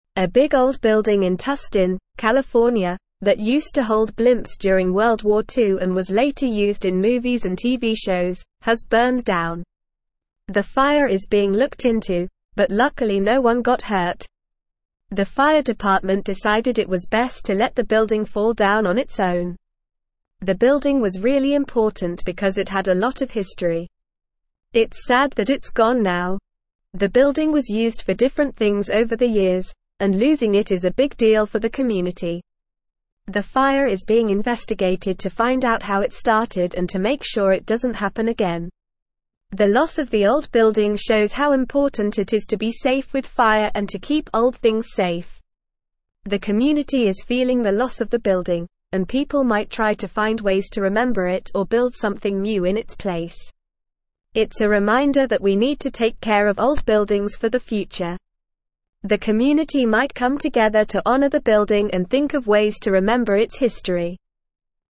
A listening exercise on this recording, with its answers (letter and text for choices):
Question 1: What was the building in Tustin, California, used for during World War Two?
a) Storing cars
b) Housing soldiers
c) Holding blimps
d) Growing crops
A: c) Holding blimps

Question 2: What happened to the building in Tustin, California?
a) It burned down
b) It was demolished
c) It was renovated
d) It was sold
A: a) It burned down

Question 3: Why is the building important to the community?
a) It's the tallest building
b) It has a lot of history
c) It's made of special materials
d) It's the newest building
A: b) It has a lot of history

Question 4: What is being done to find out how the fire started?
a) The fire is being investigated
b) The building is being rebuilt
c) The community is holding a memorial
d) The fire is being ignored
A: a) The fire is being investigated

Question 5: What does the loss of the old building show the community?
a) The need for new buildings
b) The need for more open spaces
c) The importance of being safe with fire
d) The need for more modern buildings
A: c) The importance of being safe with fire

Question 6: How might the community honor the building?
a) By forgetting about it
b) By finding ways to remember it or building something new in its place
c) By building a new shopping mall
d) By holding a demolition ceremony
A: b) By finding ways to remember it or building something new in its place

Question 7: What is the reminder for the community about old buildings?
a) The need to tear them down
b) The need to build more of them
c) The need to forget about them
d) The need to take care of them for the future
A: d) The need to take care of them for the future

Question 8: What might the community come together to do in honor of the building?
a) Hold a memorial service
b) Build a new park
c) Ignore its history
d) Think of ways to remember its history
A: d) Think of ways to remember its history

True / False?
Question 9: The incident does not serve as a reminder of the importance of fire safety and preserving old buildings.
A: False

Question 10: People in the community may come together to find ways to commemorate the building and its history.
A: True

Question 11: The community is saddened by the loss of the building and is considering ways to honor its memory.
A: True

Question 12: The loss of the building has had a significant impact on the community, and there may be discussions about constructing something new in its place.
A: True

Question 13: The building had no historical significance and had never been used for various purposes over the years.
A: False

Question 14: A modern building in Tustin, California, which used to house blimps during World War Two, has recently burned down.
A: False

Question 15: The fire is not currently under investigation and its cause remains unknown.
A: False

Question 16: The fire did not cause any injuries, but the building was deemed unsafe and was allowed to collapse on its own by the fire department.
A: True

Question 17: What was the big old building in Tustin, California used for during World War Two?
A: The big old building in Tustin, California was used to hold blimps during World War Two.

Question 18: Can you name some of the ways the building was used after the war?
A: After the war, the building was used in movies and TV shows.

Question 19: What happened to the building recently?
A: Recently, the building burned down.

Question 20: Why did the fire department decide to let the building collapse on its own?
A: The fire department decided it was best to let the building collapse on its own for safety reasons.

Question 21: What is the current status of the investigation into the fire?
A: The fire is being investigated to find out how it started and to make sure it doesn't happen again.

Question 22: Why is it important to preserve old buildings, according to the article?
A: Preserving old buildings is important because they have historical value and losing them is a big deal for the community.

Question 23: What might the community do to honor the building's history?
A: The community might come together to honor the building and think of ways to remember its history, possibly by creating a memorial or incorporating its story into a new project.

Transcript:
A big old building in Tustin, California, that used to hold blimps during World War Two and was later used in movies and TV shows, has burned down. The fire is being looked into, but luckily no one got hurt. The fire department decided it was best to let the building fall down on its own.
The building was really important because it had a lot of history. It's sad that it's gone now. The building was used for different things over the years, and losing it is a big deal for the community.
The fire is being investigated to find out how it started and to make sure it doesn't happen again. The loss of the old building shows how important it is to be safe with fire and to keep old things safe.
The community is feeling the loss of the building, and people might try to find ways to remember it or build something new in its place. It's a reminder that we need to take care of old buildings for the future. The community might come together to honor the building and think of ways to remember its history.

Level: Level 3